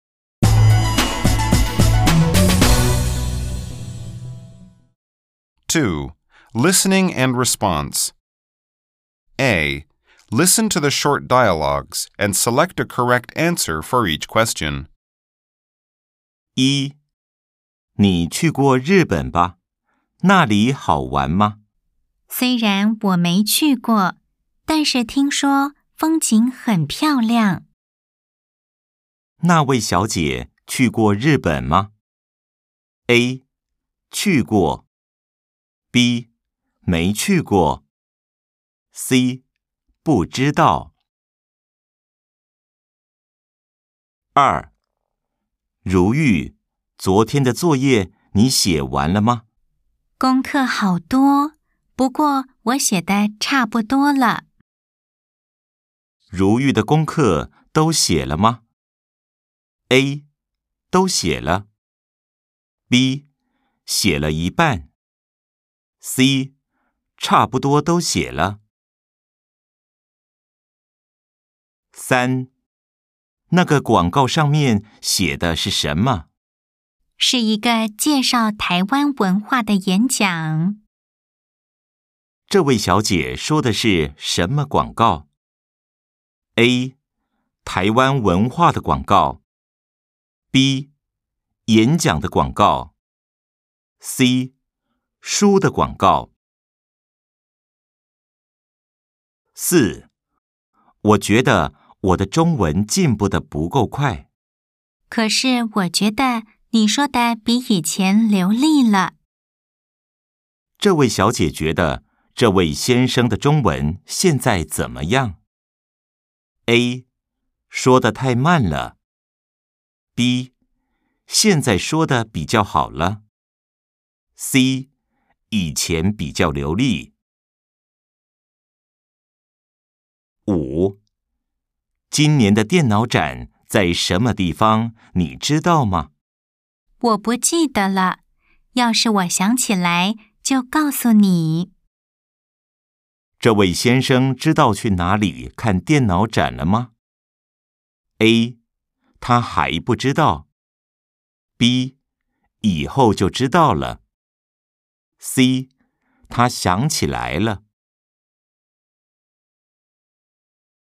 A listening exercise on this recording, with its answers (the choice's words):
A. Nghe đoạn hội thoại ngắn và chọn câu trả lời đúng.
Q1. 那位小姐去過日本嗎?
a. 去過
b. 沒去過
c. 不知道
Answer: 沒去過

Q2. 如玉的功課都寫了嗎?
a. 都寫了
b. 寫了一半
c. 差不多都寫了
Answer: 差不多都寫了

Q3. 這位小姐說的是什麼廣告?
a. 台灣文化的廣告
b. 演講的廣告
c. 書的廣告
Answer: 台灣文化的廣告

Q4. 這位小姐覺得這位先生的中文現在怎麼樣?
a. 說得太慢了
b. 現在說得比較好了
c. 以前比較流利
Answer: 現在說得比較好了

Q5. 這位先生知道去哪裡看電腦展了嗎?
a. 他還不知道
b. 以後就知道了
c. 他想起來了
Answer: 他還不知道